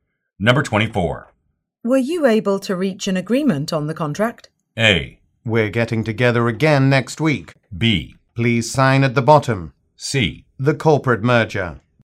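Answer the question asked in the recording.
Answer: A: We're getting together again next week.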